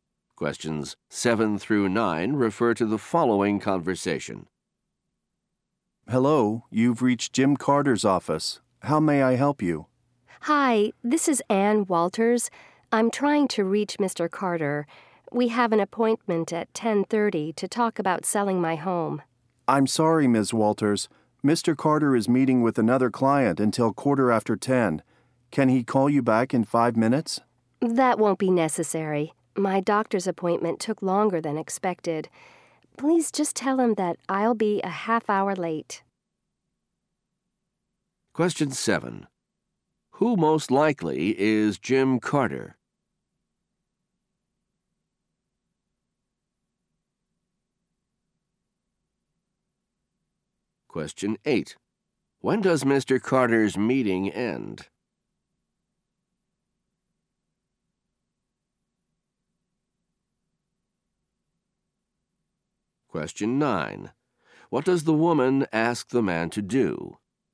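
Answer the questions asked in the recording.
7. A real estate agent
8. At 10:15
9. Tell Mr. Carter she'll be half an hour late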